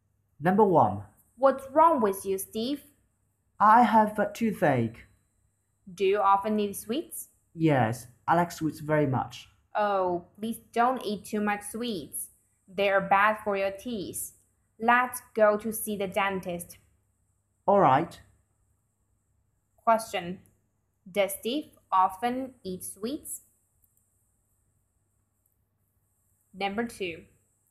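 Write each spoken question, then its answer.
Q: Does Steve often eat sweets?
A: Yes, he does.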